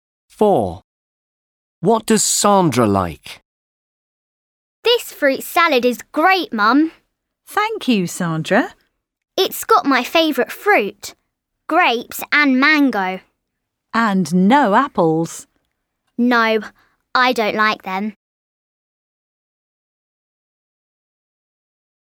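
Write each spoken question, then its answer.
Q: What does Sandra like?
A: grapes and mango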